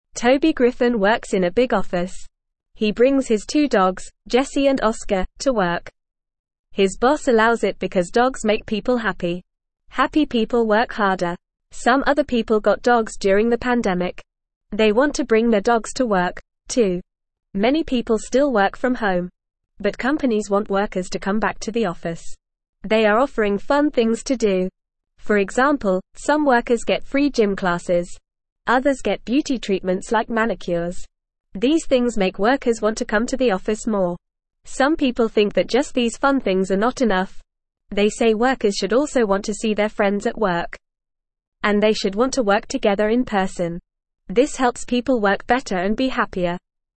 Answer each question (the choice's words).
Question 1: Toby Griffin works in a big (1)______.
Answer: office

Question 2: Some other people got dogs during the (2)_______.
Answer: pandemic

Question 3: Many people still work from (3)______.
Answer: home

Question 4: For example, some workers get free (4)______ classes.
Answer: gym

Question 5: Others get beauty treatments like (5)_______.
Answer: manicures

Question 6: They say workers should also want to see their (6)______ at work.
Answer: friends

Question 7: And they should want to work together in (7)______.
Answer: person

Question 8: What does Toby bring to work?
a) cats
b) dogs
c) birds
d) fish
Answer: dogs

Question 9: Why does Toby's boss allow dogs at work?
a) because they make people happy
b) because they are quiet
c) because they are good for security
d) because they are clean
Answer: because they make people happy

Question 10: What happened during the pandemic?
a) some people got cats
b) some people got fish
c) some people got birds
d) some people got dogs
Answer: some people got dogs

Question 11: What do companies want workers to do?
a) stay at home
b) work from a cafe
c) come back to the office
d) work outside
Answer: come back to the office

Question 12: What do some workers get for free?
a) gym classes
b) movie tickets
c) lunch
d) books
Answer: gym classes

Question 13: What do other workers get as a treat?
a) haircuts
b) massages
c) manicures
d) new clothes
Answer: manicures

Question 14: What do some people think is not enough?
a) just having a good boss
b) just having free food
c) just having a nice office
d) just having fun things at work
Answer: just having fun things at work

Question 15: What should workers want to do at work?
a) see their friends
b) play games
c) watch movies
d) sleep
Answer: see their friends

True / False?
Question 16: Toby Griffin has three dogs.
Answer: False

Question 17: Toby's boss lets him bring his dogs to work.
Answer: True

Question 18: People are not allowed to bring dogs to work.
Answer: False

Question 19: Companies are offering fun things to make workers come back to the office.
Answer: True

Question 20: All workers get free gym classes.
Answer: False

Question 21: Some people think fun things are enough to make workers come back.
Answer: False

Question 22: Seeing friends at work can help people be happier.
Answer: True

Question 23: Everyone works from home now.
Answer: False

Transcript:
Toby Griffin works in a big office. He brings his two dogs, Jesse and Oscar, to work. His boss allows it because dogs make people happy. Happy people work harder. Some other people got dogs during the pandemic. They want to bring their dogs to work, too.
Many people still work from home. But companies want workers to come back to the office. They are offering fun things to do. For example, some workers get free gym classes. Others get beauty treatments like manicures. These things make workers want to come to the office more.
Some people think that just these fun things are not enough. They say workers should also want to see their friends at work. And they should want to work together in person. This helps people work better and be happier.

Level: Level 1